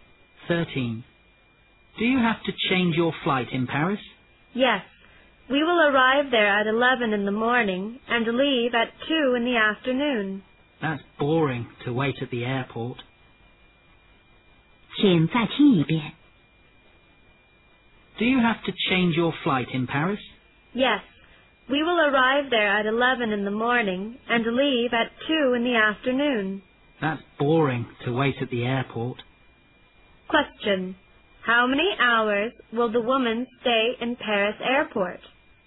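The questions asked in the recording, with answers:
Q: How many hours will the woman stay in Paris airport?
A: Three hours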